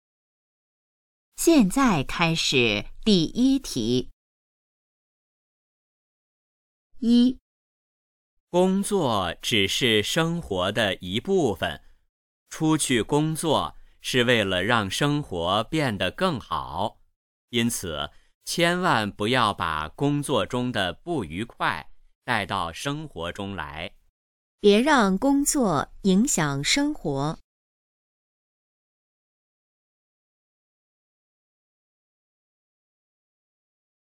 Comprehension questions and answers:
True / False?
别让工作影响生活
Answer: True

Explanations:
别 = don't, 让 = let/allow. This pattern expresses prohibition or advice.

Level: HSK 4